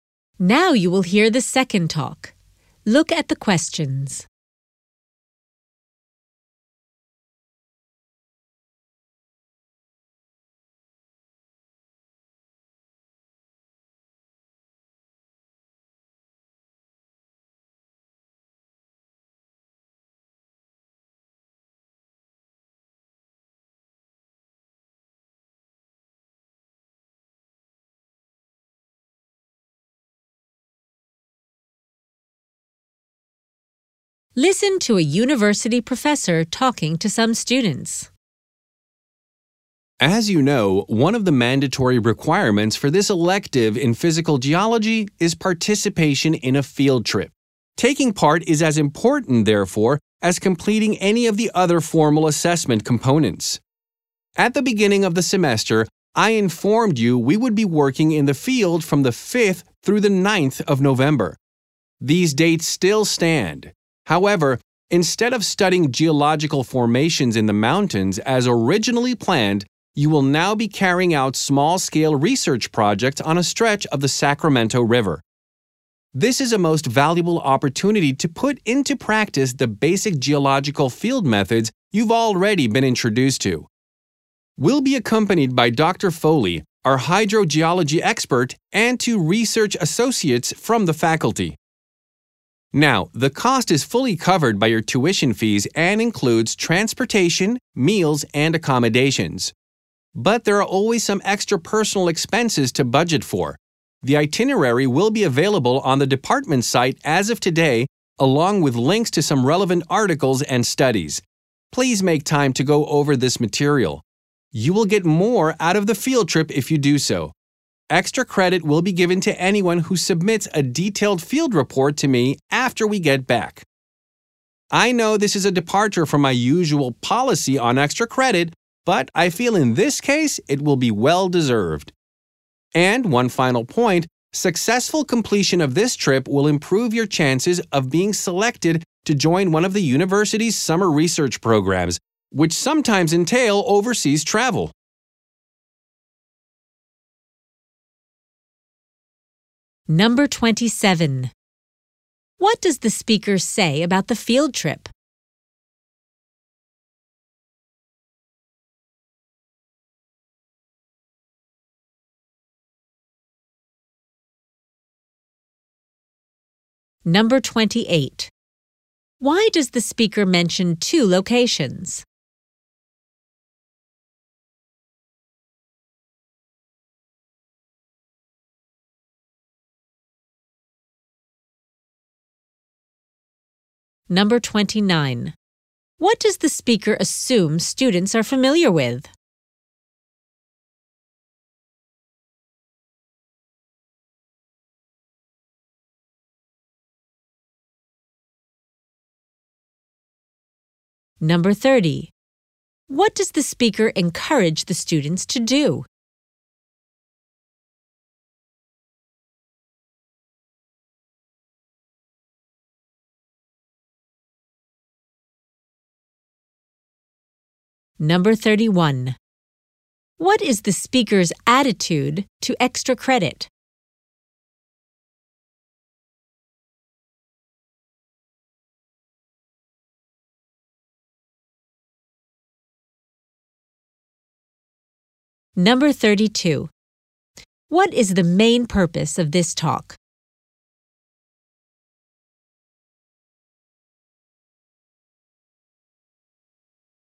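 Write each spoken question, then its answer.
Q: What does the speaker say about the field trip?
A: It is mandatory and as important as the other assessment components.

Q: Why does the speaker mention two locations?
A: The location has changed from the mountains to the Sacramento River.

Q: What does the speaker assume students are familiar with?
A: Basic geological field methods.

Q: What does the speaker encourage the students to do?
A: To read the itinerary material and relevant articles before the trip.

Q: What is the speaker's attitude to extra credit?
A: He does not usually give it, but makes an exception here.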